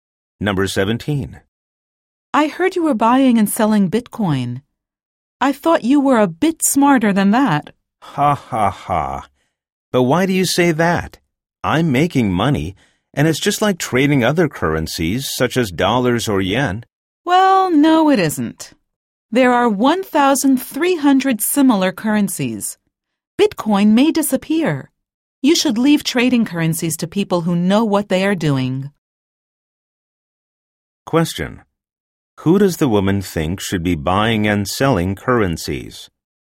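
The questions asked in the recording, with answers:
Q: Who does the woman think should be buying and selling currencies?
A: People who know what they are doing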